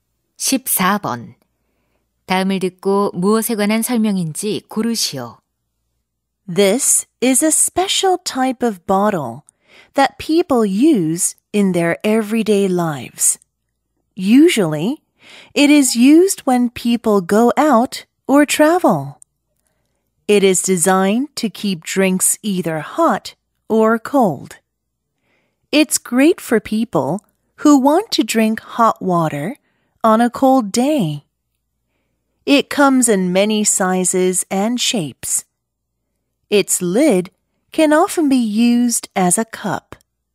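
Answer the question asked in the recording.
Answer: 보온병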